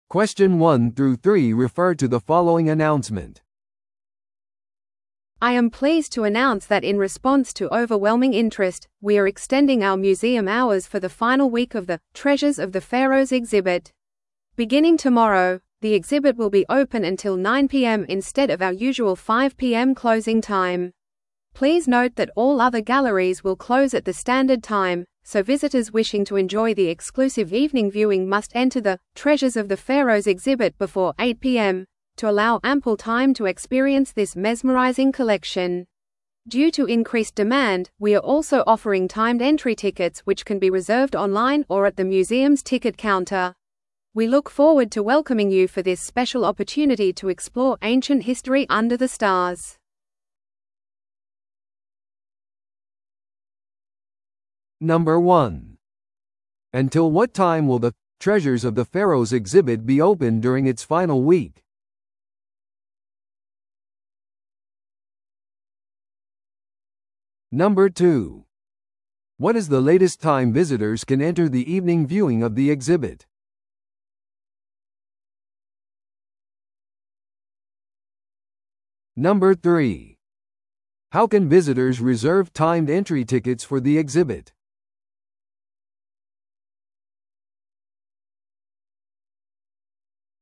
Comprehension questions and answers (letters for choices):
Listen to the audio below and answer the questions.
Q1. Until what time will the 'Treasures of the Pharaohs' exhibit be open during its final week?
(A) 5pm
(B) 8pm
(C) 9pm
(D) 10pm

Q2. What is the latest time visitors can enter the evening viewing of the exhibit?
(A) 5pm前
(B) 6pm前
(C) 8pm前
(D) 9pm前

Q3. How can visitors reserve timed entry tickets for the exhibit?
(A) 入口で購入することによって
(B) 電話でのみ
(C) オンラインまたはチケットカウンターで予約することによって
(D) 郵便でのリクエストによって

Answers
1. C
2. C
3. C

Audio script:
I am pleased to announce that in response to overwhelming interest, we are extending our museum hours for the final week of the 'Treasures of the Pharaohs' exhibit. Beginning tomorrow, the exhibit will be open until 9pm instead of our usual 5pm closing time. Please note that all other galleries will close at the standard time, so visitors wishing to enjoy the exclusive evening viewing must enter the 'Treasures of the Pharaohs' exhibit before 8pm, to allow ample time to experience this mesmerizing collection. Due to increased demand, we are also offering timed entry tickets which can be reserved online or at the museum's ticket counter. We look forward to welcoming you for this special opportunity to explore ancient history under the stars.